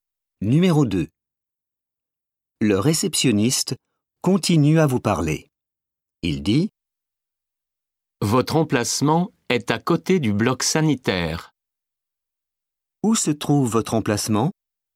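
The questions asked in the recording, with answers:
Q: Où se trouve votre emplacement?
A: À côté du bloc sanitaire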